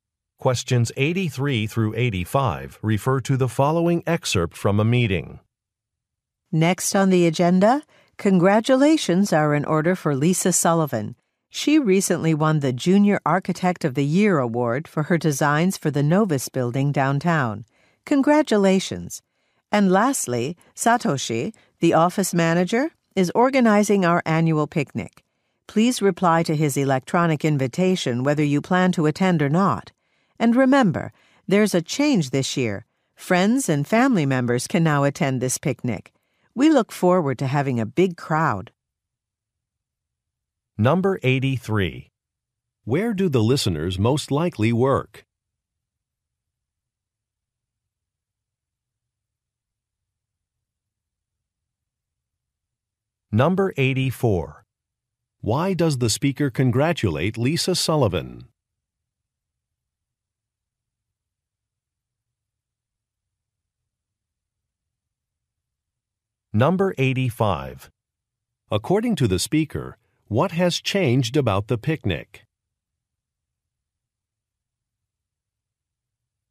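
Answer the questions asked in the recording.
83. At an architecture firm
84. She won an award
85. Friends and family can now attend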